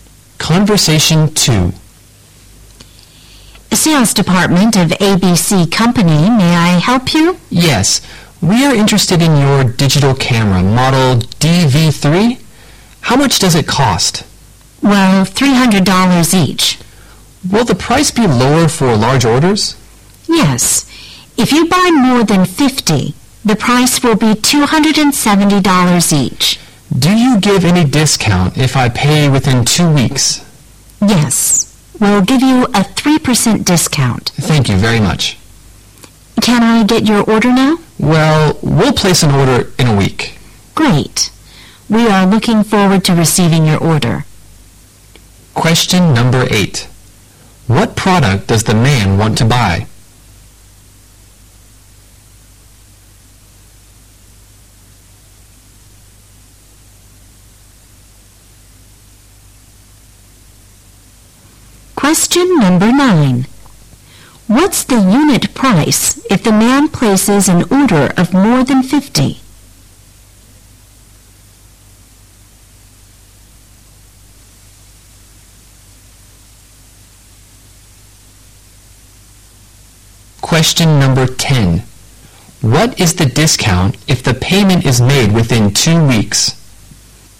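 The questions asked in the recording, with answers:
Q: What product does the man want to buy?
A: Digital cameras (model DV3)

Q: What's the unit price if the man places an order of more than 50?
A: $270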